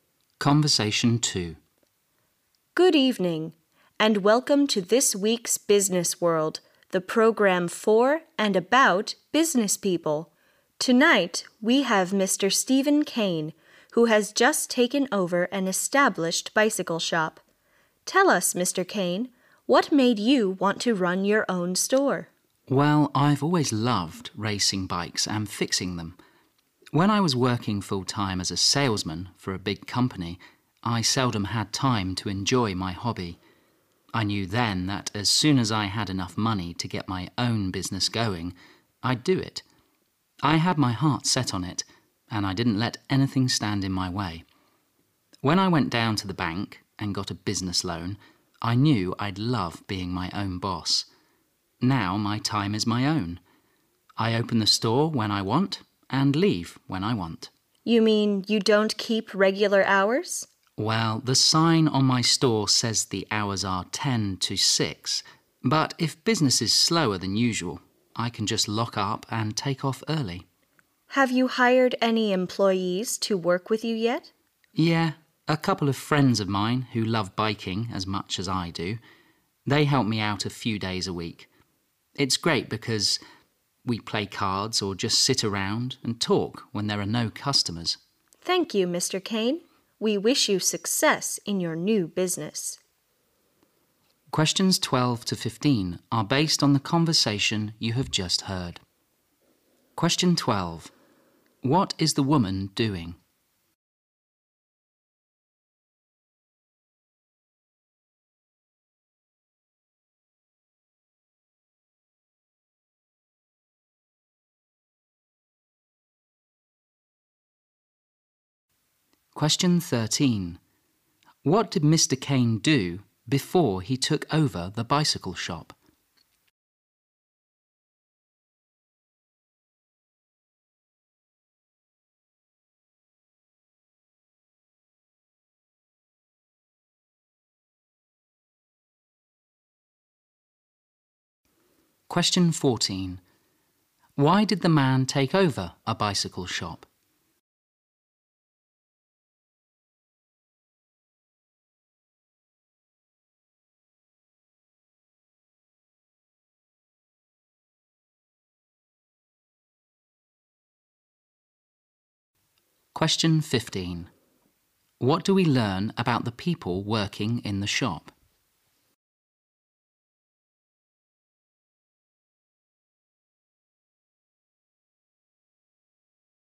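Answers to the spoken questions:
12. Interviewing a business owner on a radio program
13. He worked full-time as a salesman for a big company
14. He loves racing and fixing bikes and wanted to be his own boss
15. They are his friends who love biking and help a few days a week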